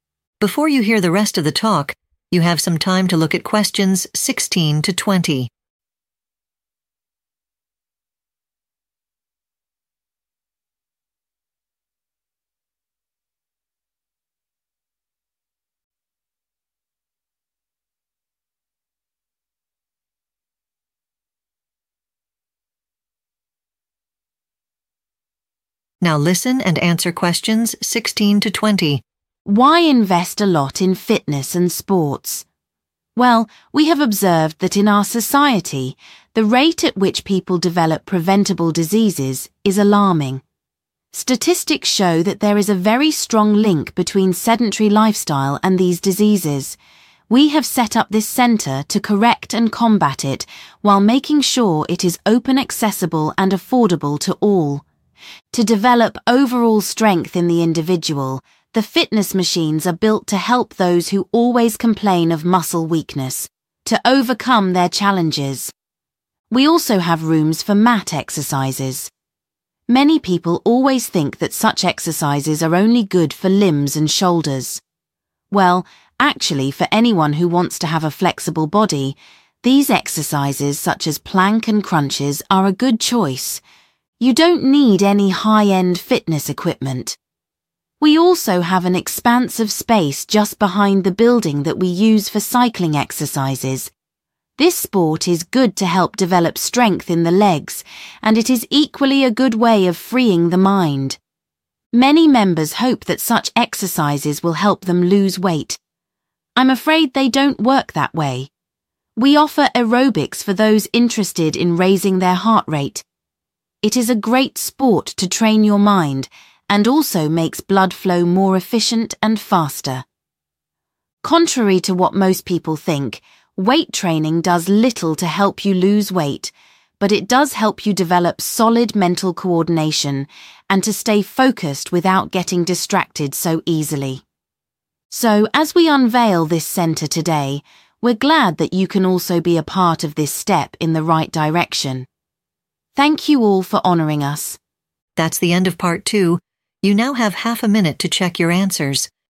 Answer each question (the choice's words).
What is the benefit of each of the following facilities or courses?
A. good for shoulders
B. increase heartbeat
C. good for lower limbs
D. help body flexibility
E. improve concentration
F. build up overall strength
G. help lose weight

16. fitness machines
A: build up overall strength

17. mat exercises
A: help body flexibility

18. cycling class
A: good for lower limbs

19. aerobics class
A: increase heartbeat

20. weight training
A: improve concentration